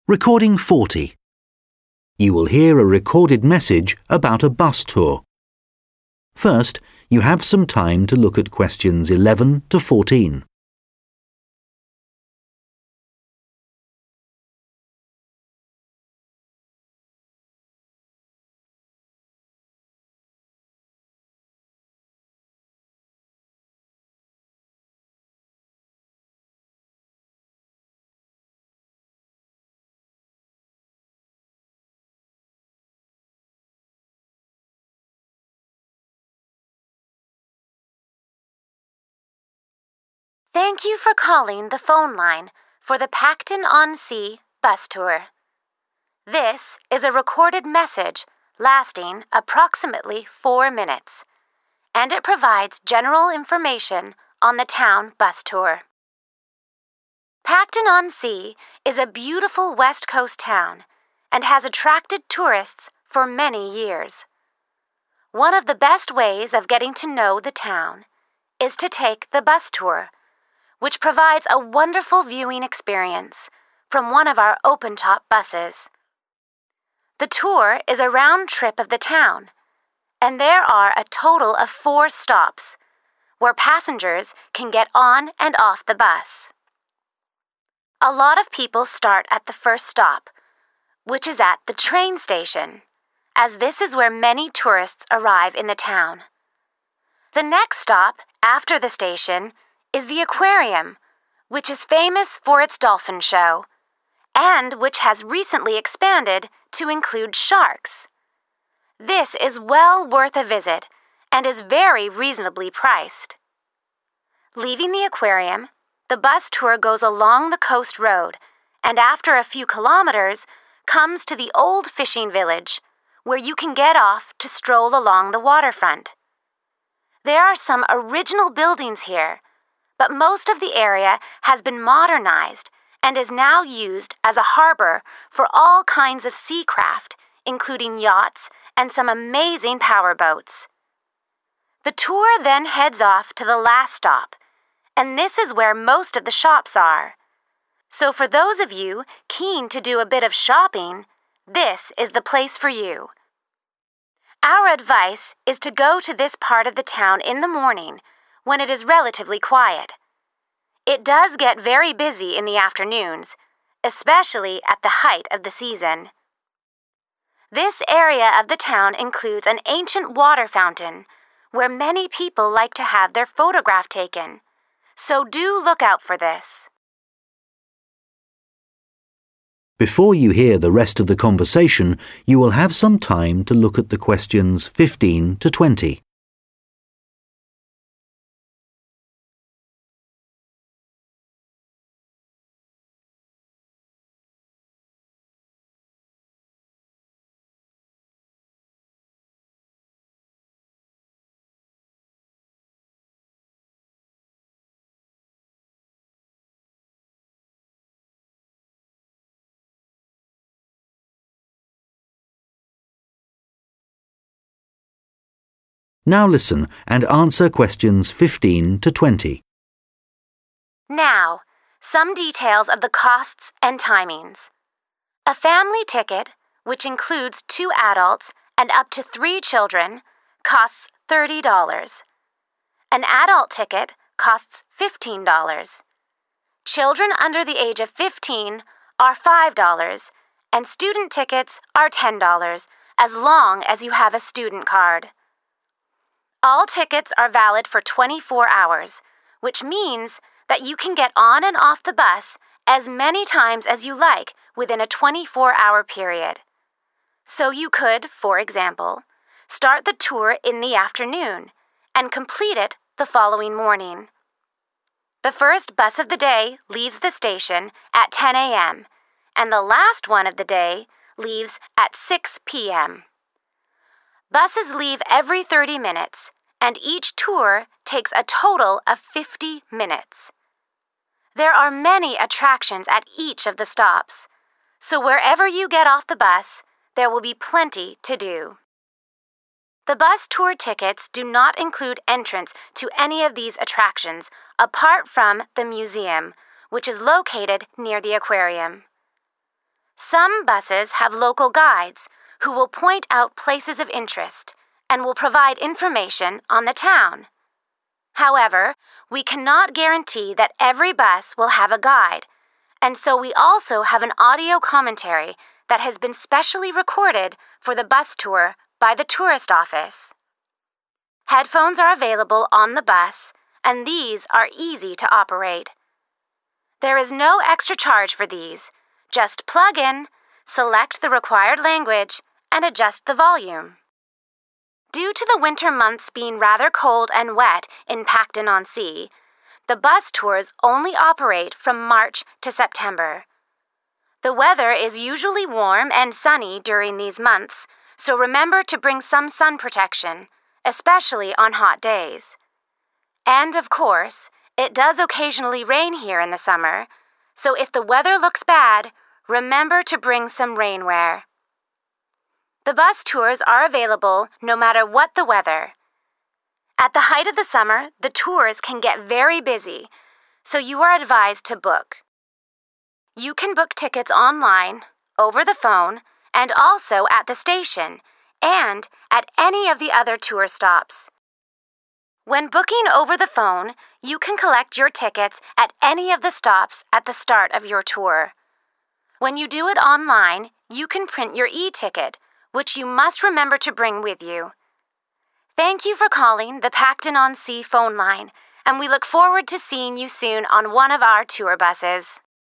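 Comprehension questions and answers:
Complete the table below.Write NO MORE THAN THREE WORDS AND/OR A NUMBER for each answer.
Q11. Things to see: dolphins and 11.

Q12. Location: 12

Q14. Things to see: very old 14.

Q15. you need to have a to buy a ticket for £ 10.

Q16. The bus tour lasts in total.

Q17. The cost of the bus ticket includes entrance to the .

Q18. You can listen to an audio commentary which has been made by the .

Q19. If the weather is wet, it is a good idea to bring .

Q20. Don't forget to bring your when you book online.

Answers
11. sharks
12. old fishing village
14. water fountain
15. student card
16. 50 minutes
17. museum
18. tourist office
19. rainwear
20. e-ticket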